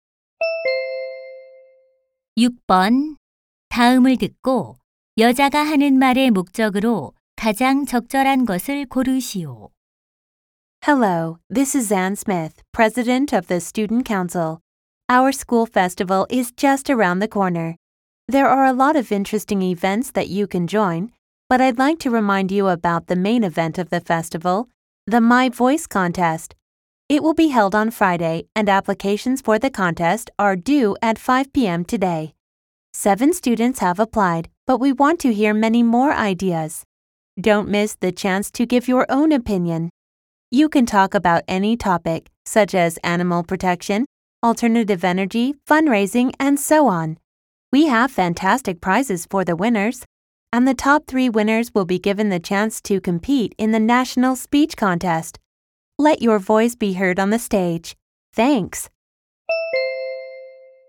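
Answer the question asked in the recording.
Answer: My Voice 대회 참가 신청을 독려하려고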